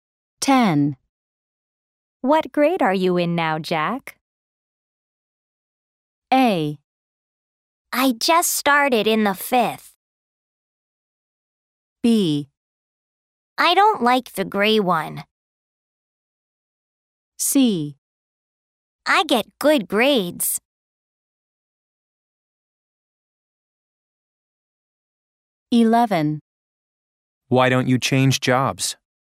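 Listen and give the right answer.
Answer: A: I just started in the fifth.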